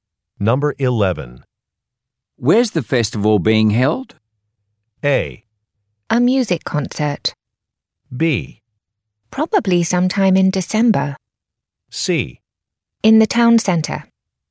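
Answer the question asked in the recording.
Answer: C: In the town centre.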